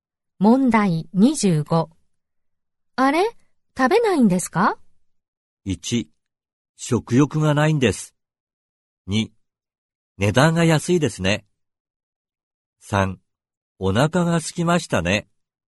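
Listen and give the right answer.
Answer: 1: 食欲がないんです。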